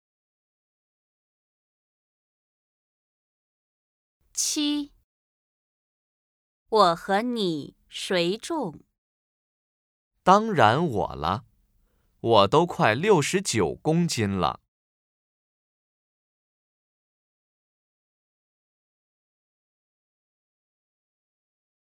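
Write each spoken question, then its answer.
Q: 我和你谁重?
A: 我(说话的人)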